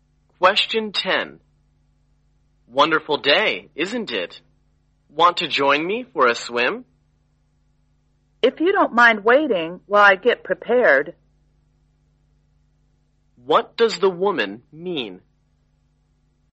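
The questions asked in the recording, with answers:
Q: What does the woman mean?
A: She will go swimming with him if he waits while she gets ready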